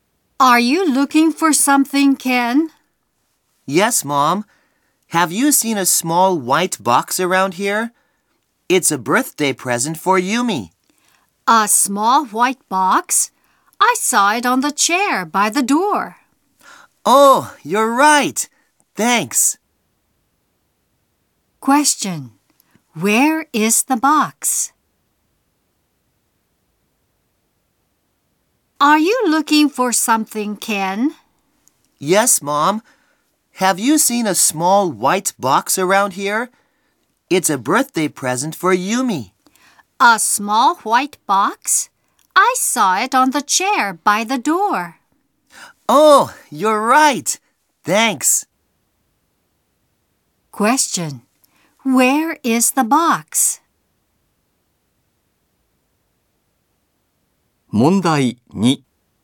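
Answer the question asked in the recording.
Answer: On the chair by the door.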